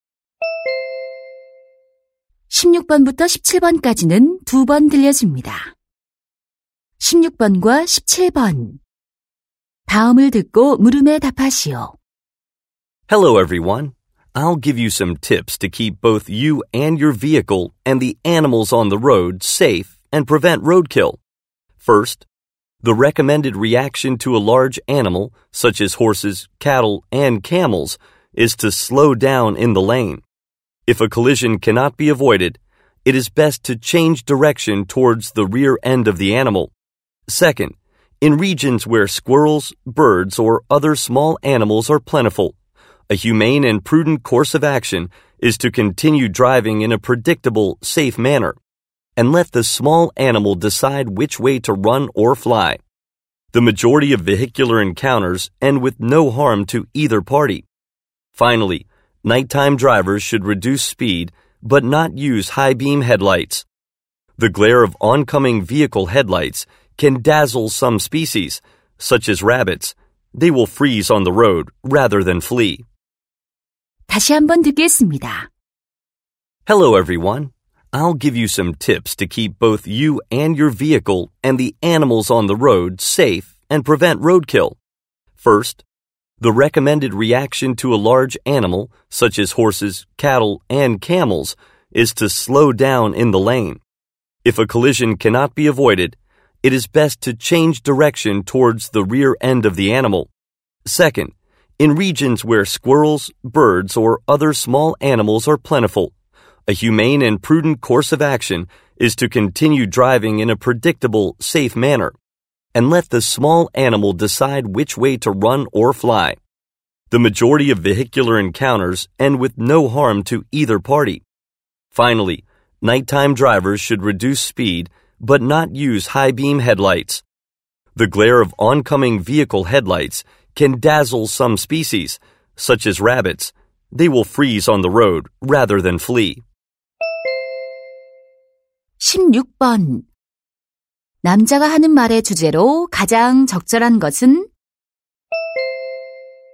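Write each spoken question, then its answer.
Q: 남자가 하는 말의 주제로 가장 적절한 것은?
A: 로드킬을 막기 위한 안전 운전 요령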